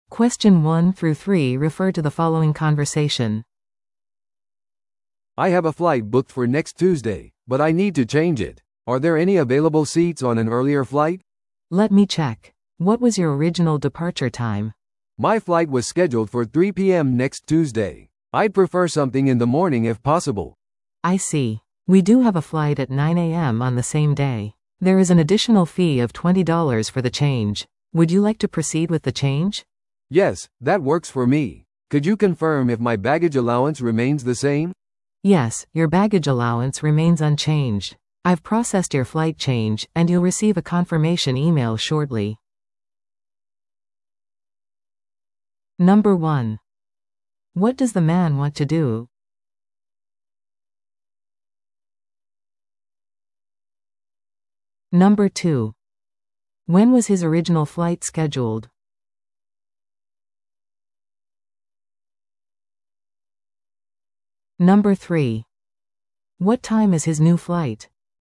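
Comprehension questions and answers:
Listen to the audio below and answer the questions.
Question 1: What does the man want to do?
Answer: Change his flight to an earlier one

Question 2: When was his original flight scheduled?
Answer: 3 PM next Tuesday

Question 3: What time is his new flight?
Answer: 9 AM

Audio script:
A: "I have a flight booked for next Tuesday, but I need to change it. Are there any available seats on an earlier flight?"
B: "Let me check. What was your original departure time?"
A: "My flight was scheduled for 3 PM next Tuesday. I'd prefer something in the morning if possible."
B: "I see. We do have a flight at 9 AM on the same day. There is an additional fee of twenty dollars for the change. Would you like to proceed with the change?"
A: "Yes, that works for me. Could you confirm if my baggage allowance remains the same?"
B: "Yes, your baggage allowance remains unchanged. 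I've processed your flight change, and you'll receive a confirmation email shortly."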